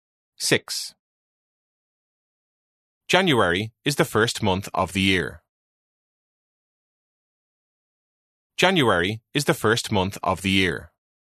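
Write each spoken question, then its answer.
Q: January is the first month of the year.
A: True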